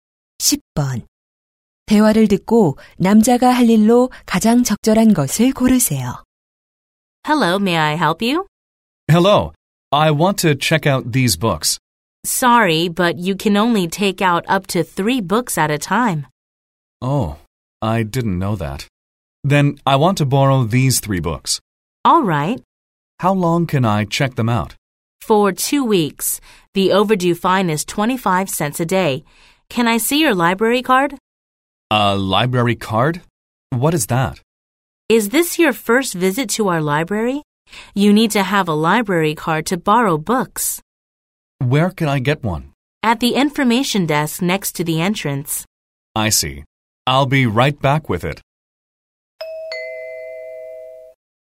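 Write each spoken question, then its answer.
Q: 대화를 듣고 남자가 할 일로 가장 적절한 것을 고르세요.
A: 도서관 카드 발급받기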